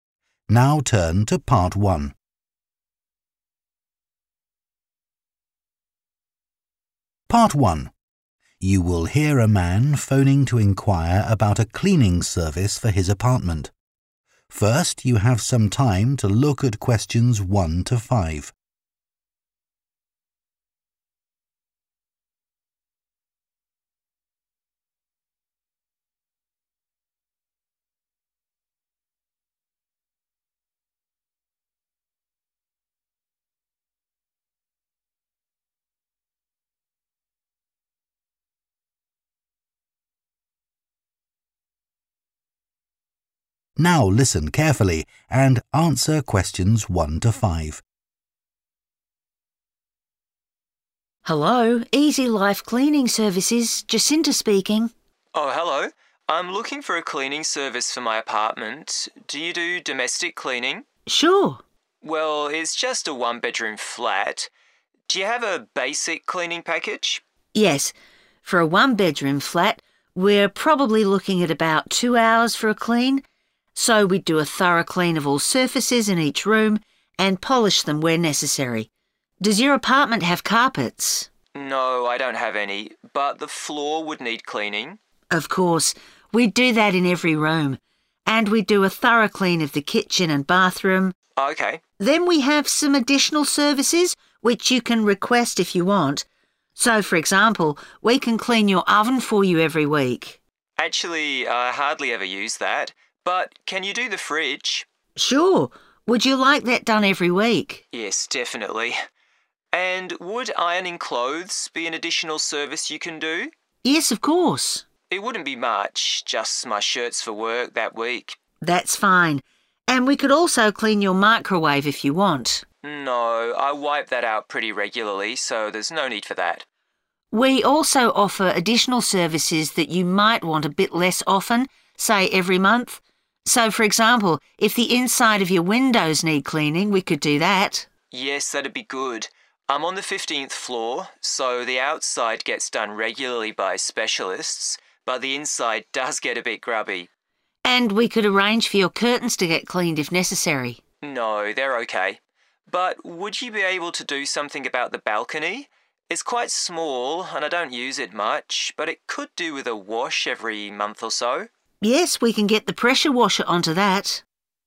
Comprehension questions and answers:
Complete the notes below. Write ONE WORD for each answer.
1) – Cleaning the 1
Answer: floor

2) – Cleaning the 2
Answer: fridge

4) – Cleaning all the 4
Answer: windows

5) – Washing down the 5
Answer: balcony

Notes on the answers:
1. Of course – we'd do that in every room [chúng tôi sẽ làm thế trong tất cả các phòng]
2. Actually, I hardly ever use that, but can you do the fridge [Tôi hầu như không bao giờ sử dụng nó (lò nướng), nhưng bạn có thể làm sạch tủ lạnh không]
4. So for example, if the inside of your windows need cleaning, we could do that [nếu phía bên trong của cửa sổ phòng bạn cần được làm sạch, chúng tôi có thể làm việc đó]
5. But would you be able to do something about the balcony [bạn có thể làm gì đó với (dọn) ban công không]